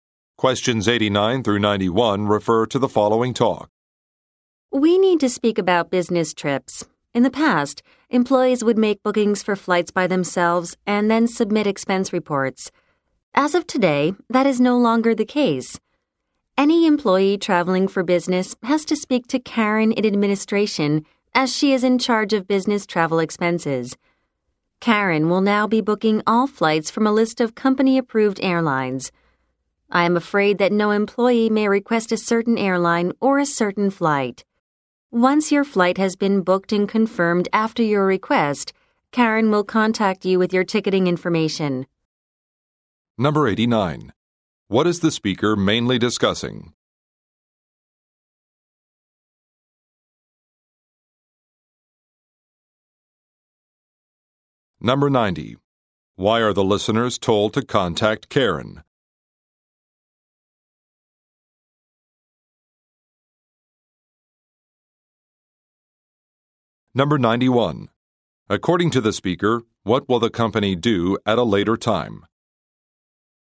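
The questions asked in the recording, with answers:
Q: What is the speaker mainly discussing?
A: A new procedure for booking business trips

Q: Why are the listeners told to contact Karen?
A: She is in charge of business travel and books all flights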